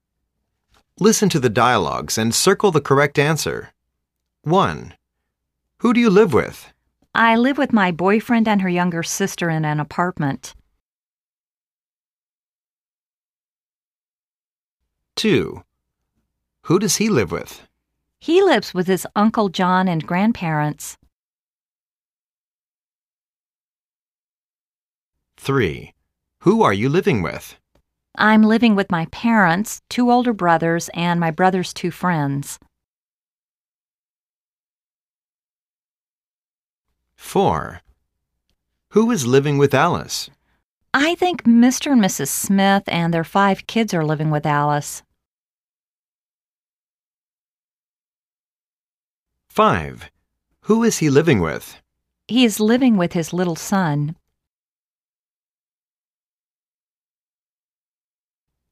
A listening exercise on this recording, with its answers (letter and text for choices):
Listen to the dialogues and circle the correct answers.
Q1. There is / are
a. 3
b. 2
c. 1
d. 5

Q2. He lives with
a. 6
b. 5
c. 4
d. 3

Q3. There are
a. 4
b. 7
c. 5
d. 6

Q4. Alice lives with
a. 6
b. 5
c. 7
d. 4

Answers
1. a. 3
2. d. 3
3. b. 7
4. c. 7